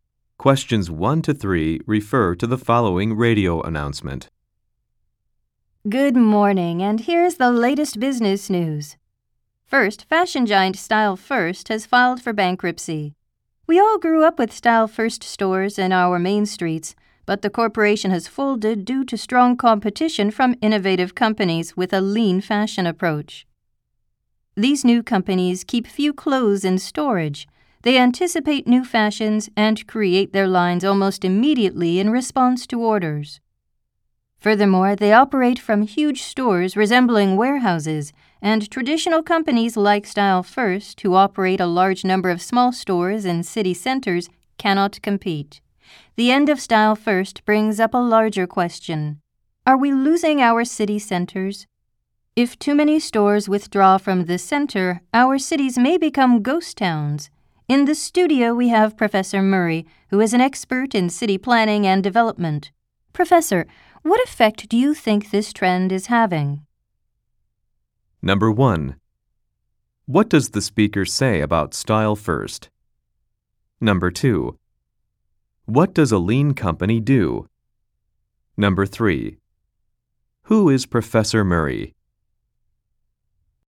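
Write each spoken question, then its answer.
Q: What does the speaker say about Style First?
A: It has filed for bankruptcy.

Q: What does a lean company do?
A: It keeps few clothes in storage and makes its lines quickly in response to orders.

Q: Who is Professor Murray?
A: An expert in city planning and development.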